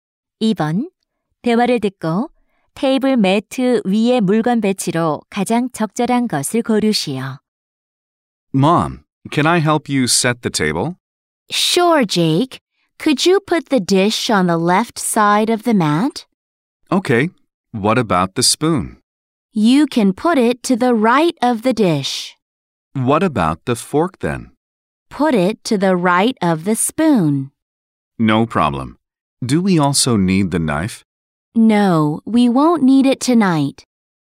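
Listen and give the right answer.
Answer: 왼쪽부터 접시, 숟가락, 포크 (나이프 없음)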